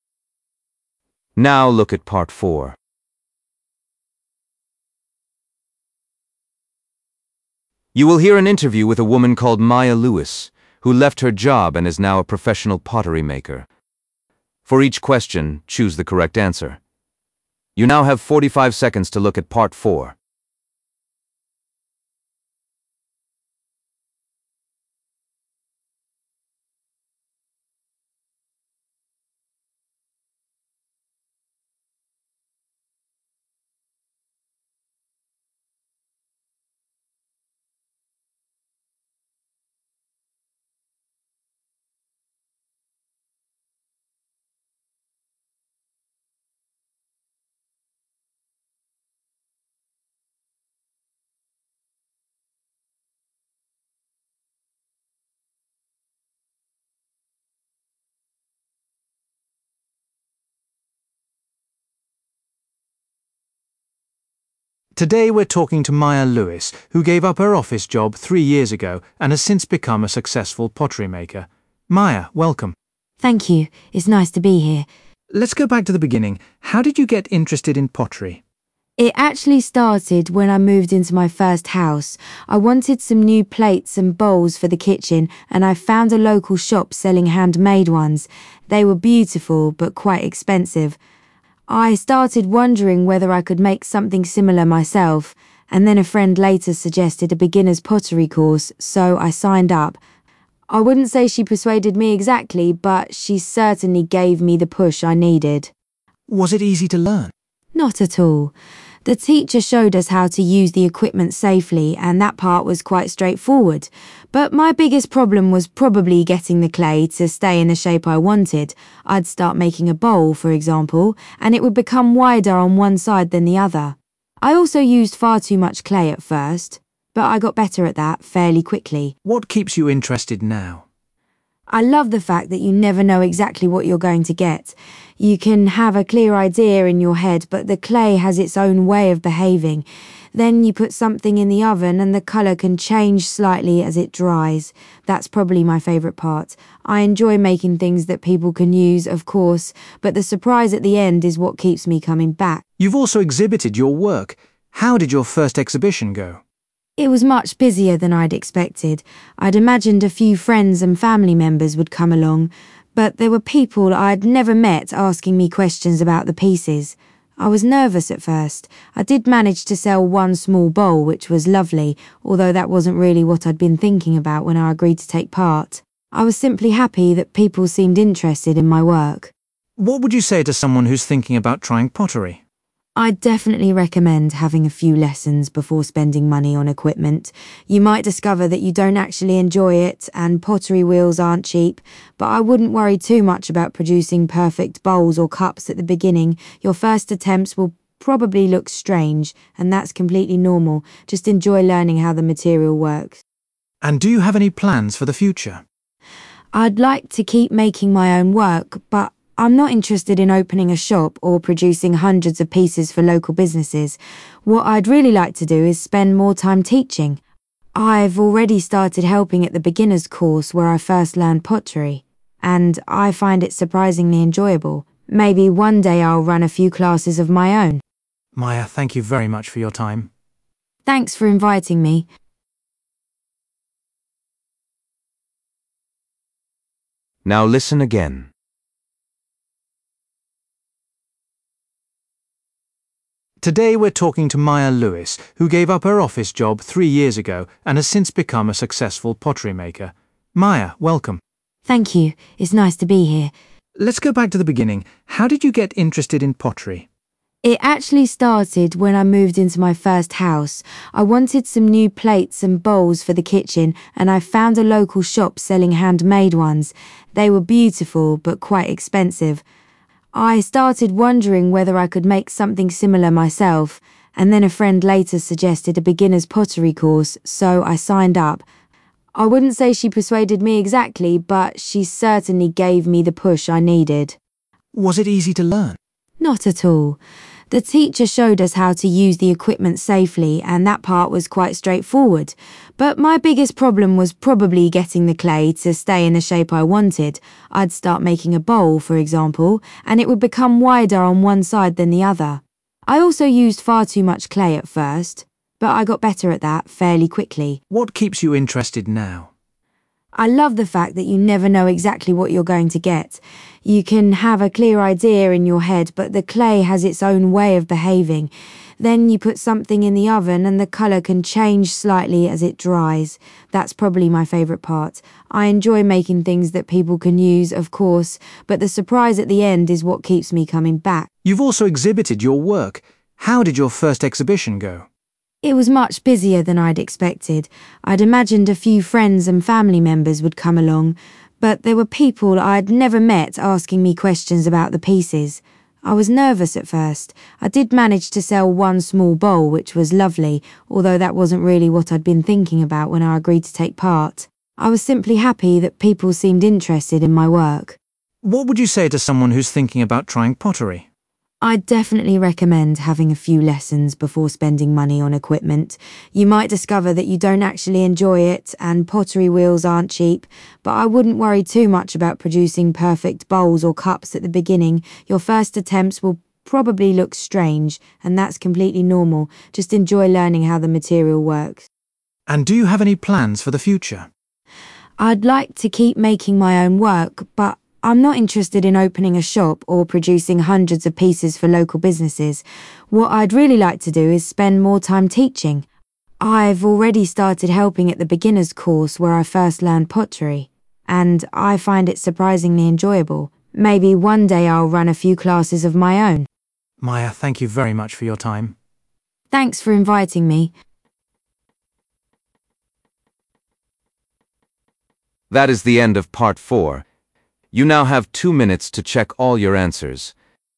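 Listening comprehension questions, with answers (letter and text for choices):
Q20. Why did Maya decide to start making pottery?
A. She wanted to make something for her new home.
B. A friend convinced her to try it.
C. She needed a new hobby after moving.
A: A. She wanted to make something for her new home.

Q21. What did Maya find most difficult when she first started?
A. Controlling the amount of clay she used.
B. Making her pots the right shape.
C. Using the equipment the right way.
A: B. Making her pots the right shape.

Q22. What does Maya enjoy most about working with clay?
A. Working with different colours.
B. Creating useful objects for everyday life.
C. Not knowing exactly what the finished piece will look like.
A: C. Not knowing exactly what the finished piece will look like.

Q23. What happened at Maya's first pottery exhibition?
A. Her friends and family visited it.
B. Not enough people attended it.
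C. She sold something for the first time.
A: C. She sold something for the first time.

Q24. What Maya suggests beginners interested in pottery should do?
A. Take lessons before investing in this hobby.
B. Start with small projects.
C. Focus on product quality.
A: A. Take lessons before investing in this hobby.

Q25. What does Maya hope to do in the future?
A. Open her own pottery studio.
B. Share her expertise with others.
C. Produce pottery for sale.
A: B. Share her expertise with others.

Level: B1 Preliminary (PET)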